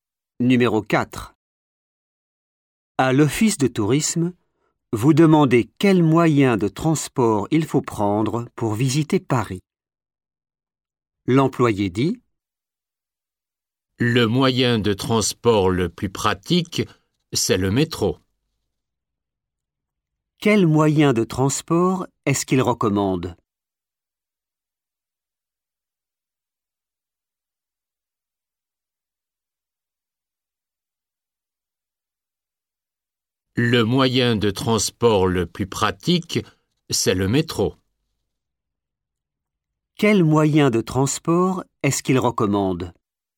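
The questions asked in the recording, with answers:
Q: Quel moyen de transport est-ce qu'il recommande?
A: le métro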